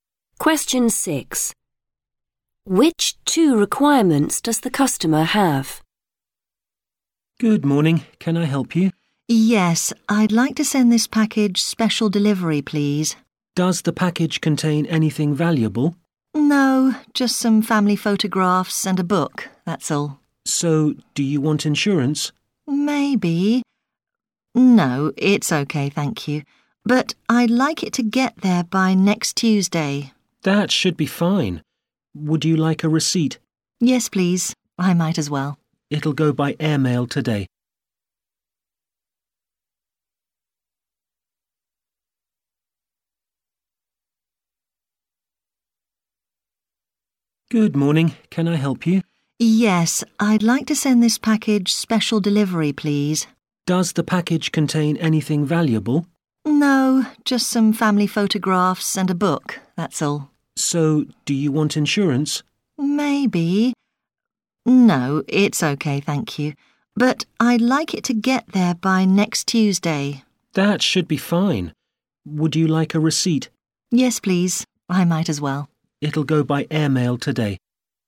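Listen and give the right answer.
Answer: Delivery by next Tuesday and a receipt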